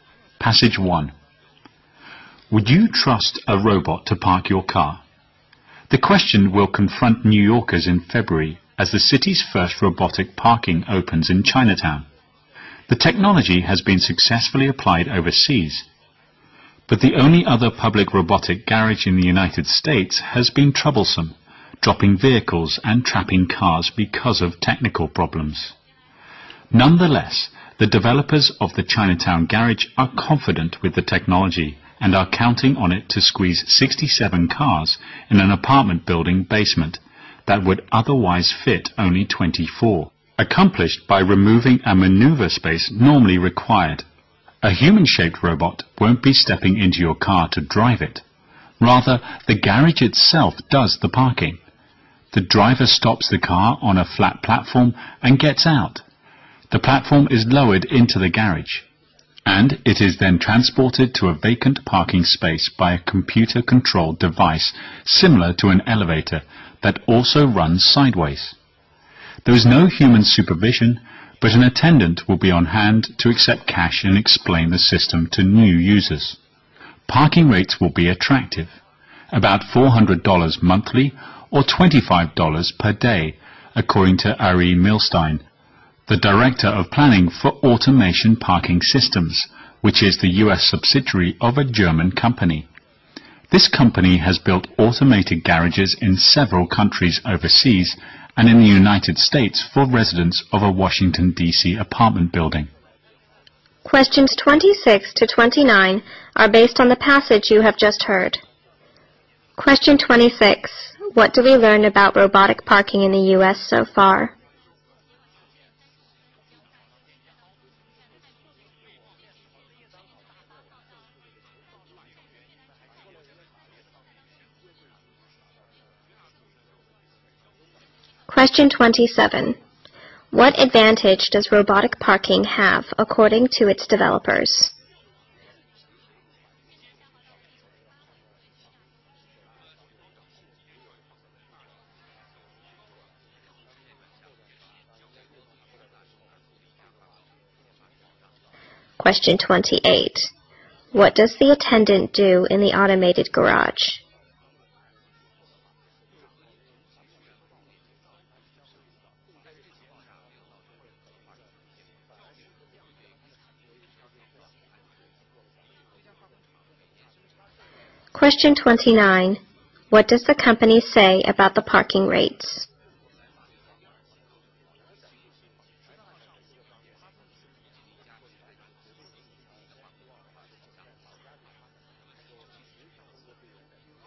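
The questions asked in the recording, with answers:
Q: What do we learn about robotic parking in the U.S. so far?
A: It has been troublesome, with technical problems

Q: What advantage does robotic parking have according to its developers?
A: It fits many more cars into the same space

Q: What does the attendant do in the automated garage?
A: Accepts cash and explains the system to new users

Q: What does the company say about the parking rates?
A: They will be attractive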